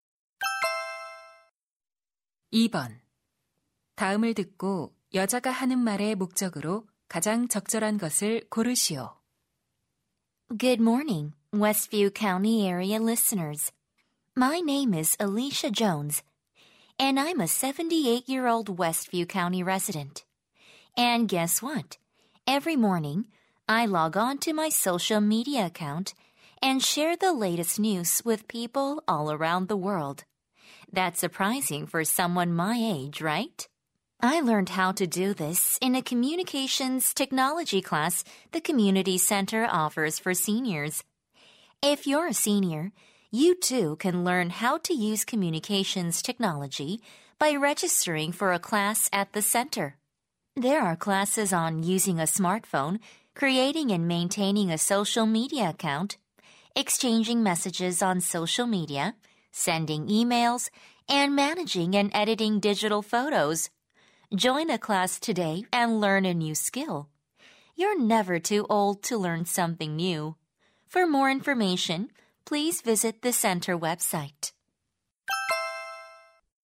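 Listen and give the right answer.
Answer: 노인 대상 통신 기술 강좌 수강을 권장하려고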